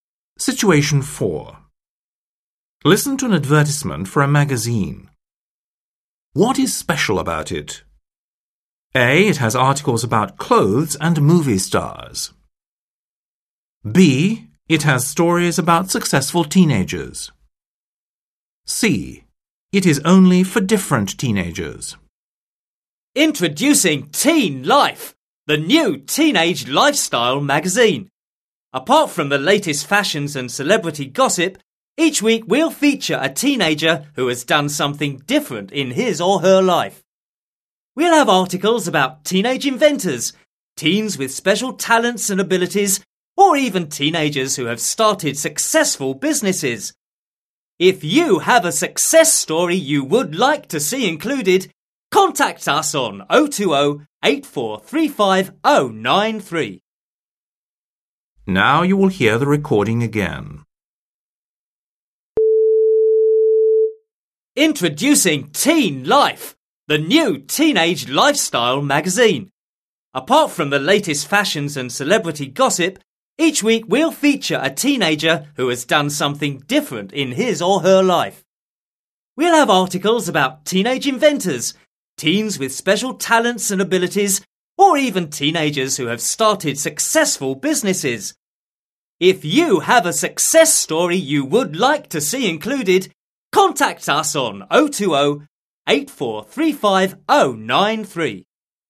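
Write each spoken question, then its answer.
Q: What is special about it?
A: B: It has stories about successful teenagers.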